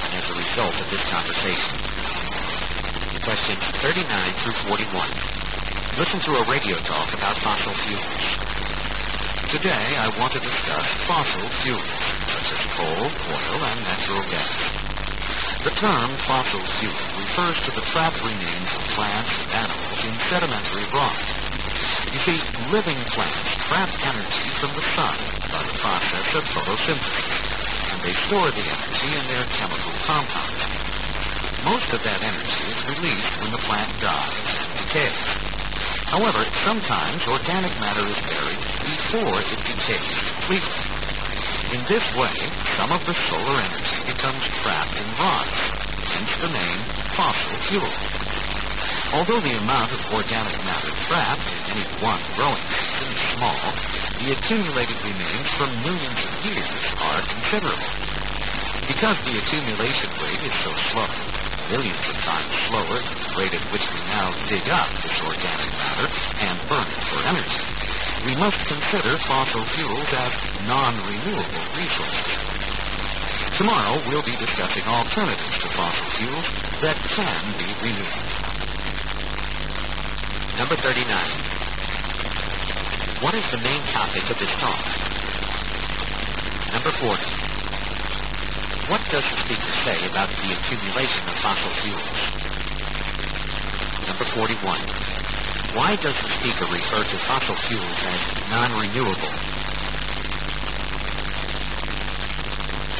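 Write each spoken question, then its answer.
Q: What is the main topic of this talk?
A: Fossil fuels and how they are formed

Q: What does the speaker say about the accumulation of fossil fuels?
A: It is very slow, but over millions of years the amount is considerable

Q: Why does the speaker refer to fossil fuels as non-renewable?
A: They accumulate far more slowly than we use them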